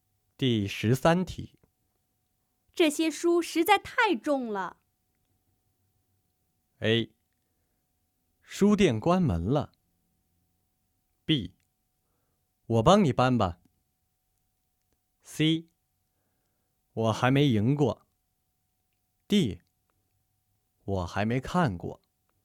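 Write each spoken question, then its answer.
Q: 这些书实在太重了。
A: B: 我帮你搬吧。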